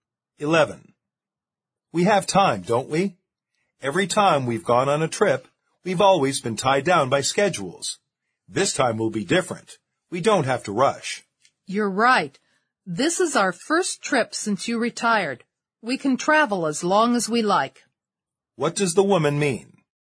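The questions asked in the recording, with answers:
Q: What does the woman mean?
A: They have no schedule this time and can travel as long as they like.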